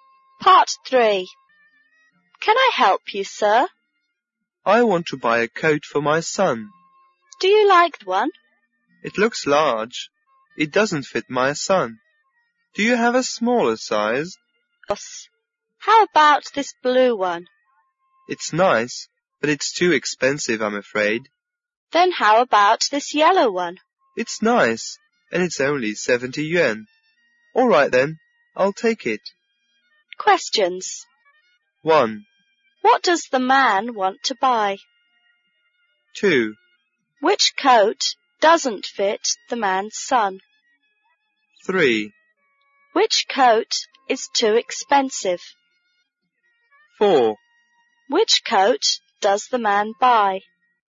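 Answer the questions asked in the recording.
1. A coat for his son
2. The first one, which is too large
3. The blue one
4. The yellow one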